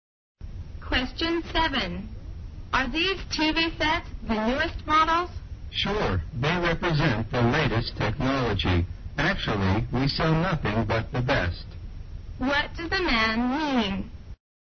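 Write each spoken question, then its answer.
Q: What does the man mean?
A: The TV sets are the newest and best models.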